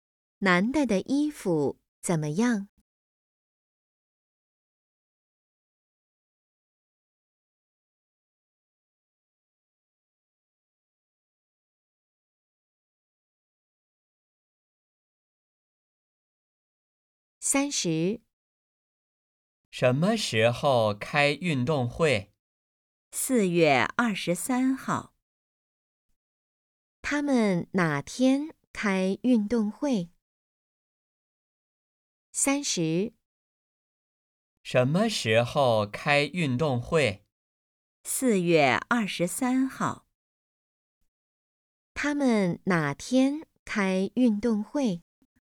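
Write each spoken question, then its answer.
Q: 他们哪天开运动会?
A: 四月二十三号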